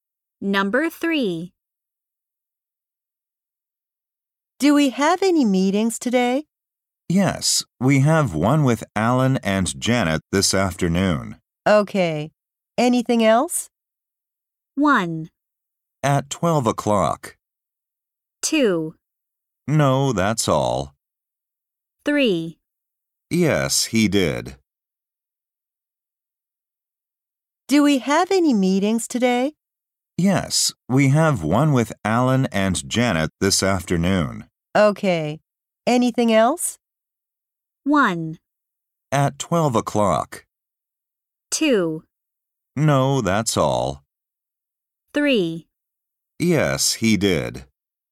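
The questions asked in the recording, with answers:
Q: Okay. Anything else?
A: 2: No, that's all.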